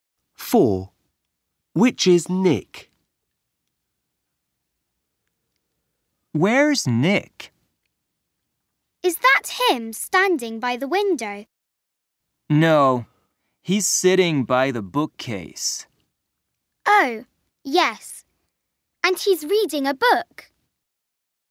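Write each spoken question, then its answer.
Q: Which is Nick?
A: The boy sitting by the bookcase, reading a book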